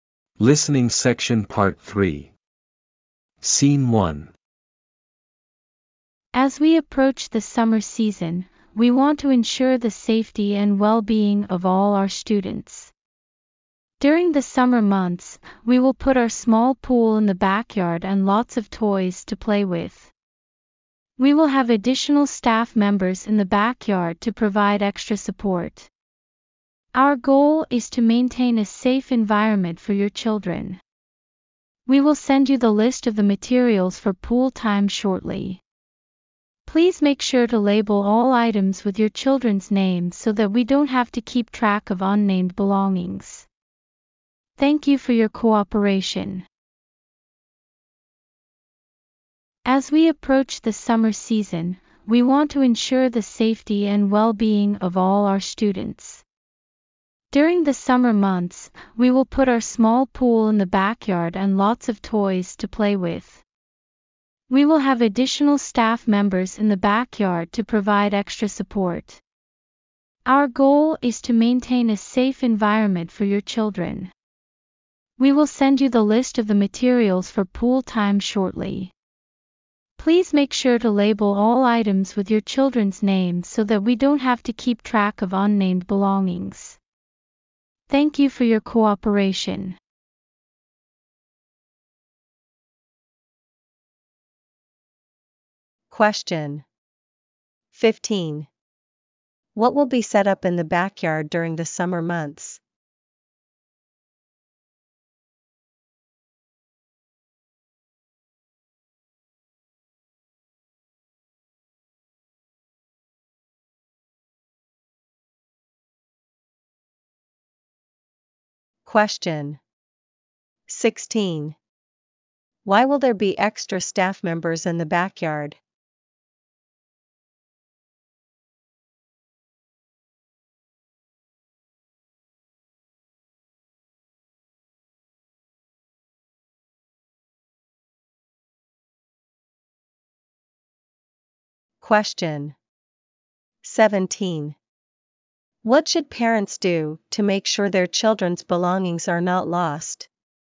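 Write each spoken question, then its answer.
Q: What will be set up in the backyard during the summer months?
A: A small pool and lots of toys

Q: Why will there be extra staff members in the backyard?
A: To provide extra support and keep the children safe

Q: What should parents do to make sure their children's belongings are not lost?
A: Label all items with the children's names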